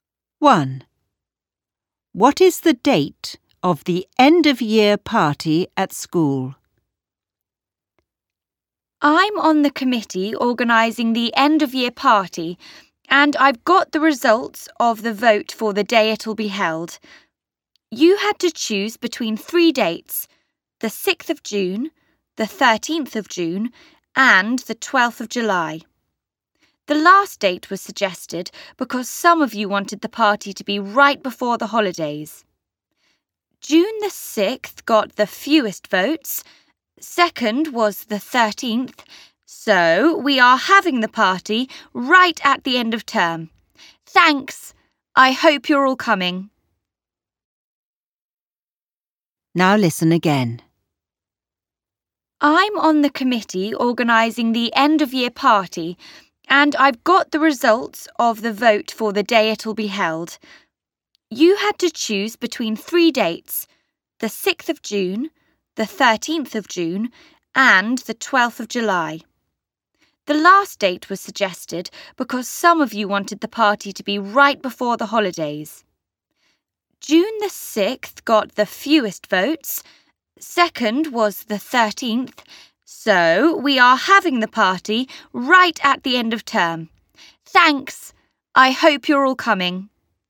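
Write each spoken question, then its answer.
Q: What is the date of the end-of-year party at school?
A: 12th of July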